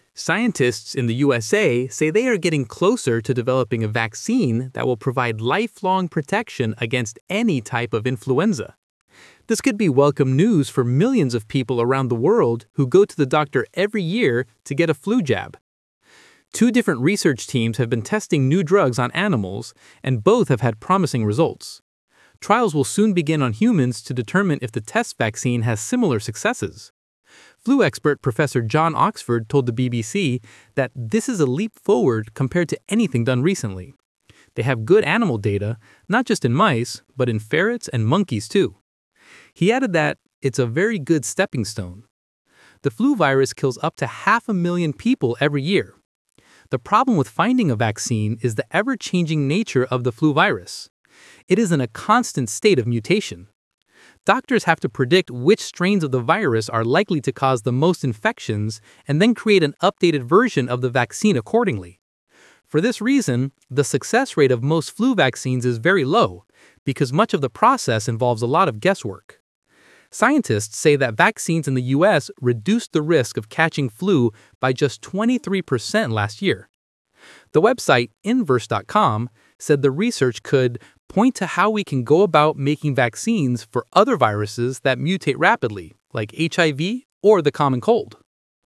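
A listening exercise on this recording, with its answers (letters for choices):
Talk/Lecture 2: Listen to a talk about the influenza vaccine.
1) What do millions of people go to the doctor every year for?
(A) a flu jab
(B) advice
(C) tissues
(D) an operation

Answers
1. A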